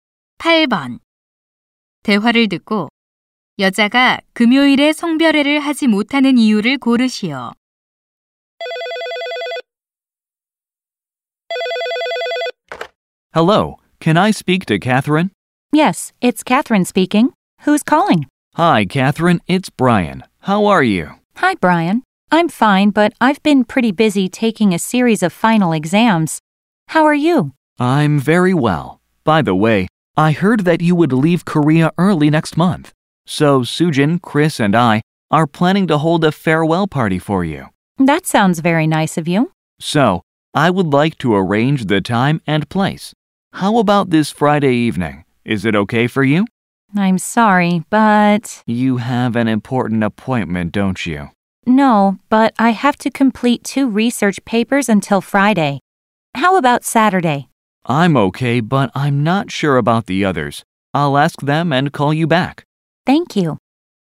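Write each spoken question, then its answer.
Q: 대화를 듣고 여자가 금요일에 성별회를 하지 못하는 이유를 고르시오.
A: 금요일까지 연구 보고서 두 편을 끝내야 해서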